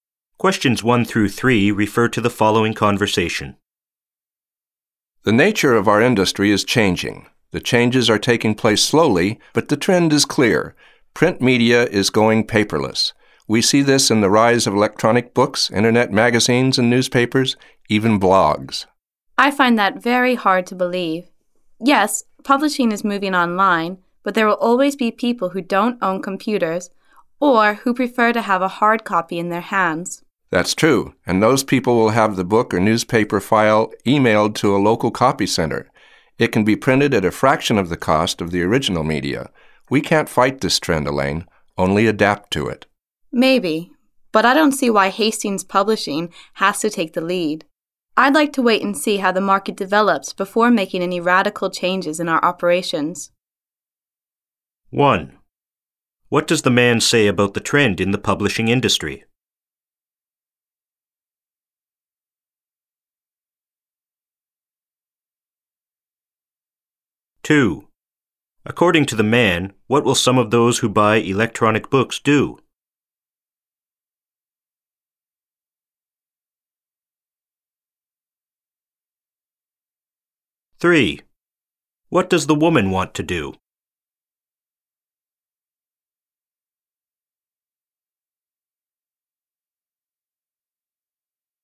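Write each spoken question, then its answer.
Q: What does the man say about the trend in the publishing industry?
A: Print media is slowly going paperless (moving online).

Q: According to the man, what will some of those who buy electronic books do?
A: Have the file emailed to a local copy center and printed.

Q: What does the woman want to do?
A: Wait and see how the market develops before making radical changes.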